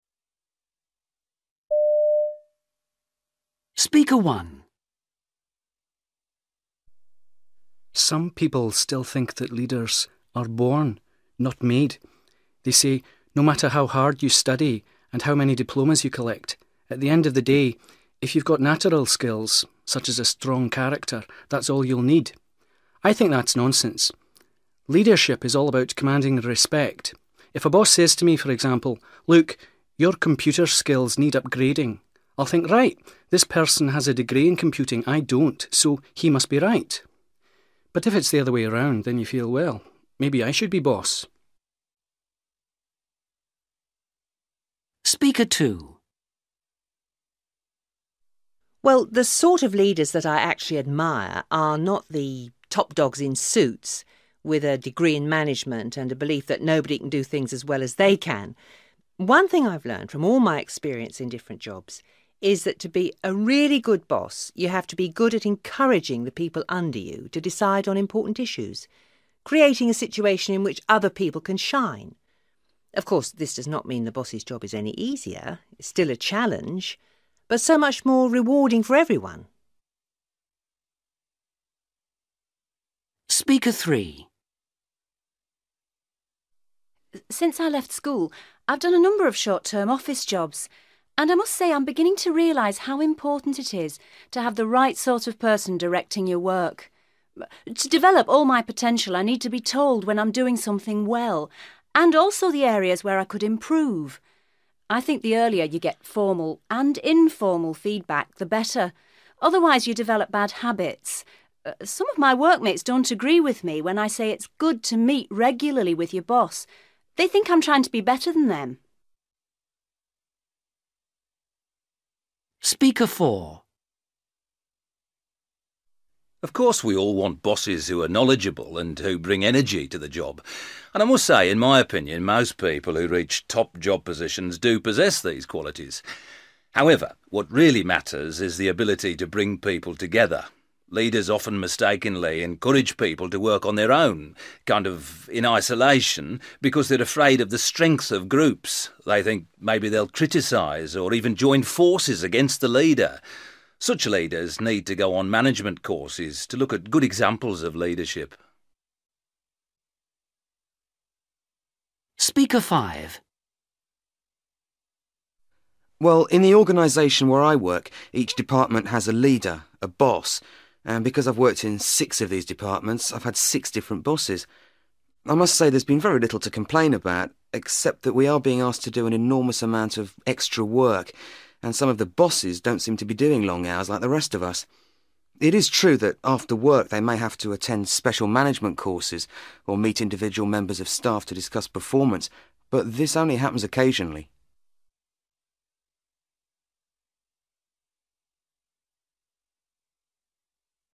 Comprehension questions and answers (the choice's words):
For questions 19-23, choose which of the opinions (A-F) each speaker expresses.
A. allow staff to take decisions.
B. encourage staff to work in teams.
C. listen to complaints from staff.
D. give information on individual progress.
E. have good qualifications.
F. set an example of hard work.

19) Speaker 1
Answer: have good qualifications.

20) Speaker 2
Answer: allow staff to take decisions.

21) Speaker 3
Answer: give information on individual progress.

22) Speaker 4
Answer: encourage staff to work in teams.

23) Speaker 5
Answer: set an example of hard work.

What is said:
Man: Some people still think that leaders are born, not made. They say, no matter how hard you study and how many diplomas you collect, at the end of the day, if you've got natural skills, such as a strong character, that's all you'll need. I think that's nonsense. Leadership is all about commanding respect. If a boss says to me, for example, 'Look, your computer skills need upgrading', I'll think, 'Right, this person has a degree in computing, I don't, so he must be right'. But if it's the other way round, then you feel, well, maybe I should be boss!
Woman: Well, the sort of leaders that I actually admire ... are not the ... top dogs in suits ... with a degree in management and a belief that nobody can do things as well as they can. One thing I've learned from all my experience in different jobs is that, to be a really good boss, you have to be good at encouraging the people under you to decide on important issues ... creating a situation in which other people can shine. Of course this does not mean the boss's job is any easier; it's still a challenge, but so much more rewarding for everyone.
Woman: Since I left school, I've done a number of short-term office jobs, and I must say I'm beginning to realise how important it is to have the right sort of person directing your work. To develop all my potential, I need to be told when I'm doing something well, and also the areas where I could improve ... I think the earlier you get formal and informal feedback, the better. Otherwise you develop bad habits ... some of my workmates don't agree with me, when I say it's good to meet regularly with your boss, they think I'm trying to be better than them.
Man: Of course we all want bosses who are knowledgeable and who bring energy to the job, and I must say, in my opinion, most people who reach top job positions do possess these qualities. However, what really matters is the ability to bring people together. Leaders often mistakenly encourage people to work on their own, kind of, in isolation, because they are afraid of the strengths of groups, they think maybe they'll criticise, or even join forces against the leader ... Such leaders need to go on management courses, to look at good examples of leadership ...
Man: Well, in the organisation where I work, each department has a leader, a boss ... and because I've worked in six of these departments, I've had six different bosses! I must say there's been very little to complain about ... except that we are being asked to do an enormous amount of extra work and some of the bosses don't seem to be doing long hours, like the rest of us. It is true that after work, they may have to attend special management courses, or meet individual members of staff to discuss performance, but this only happens occasionally ...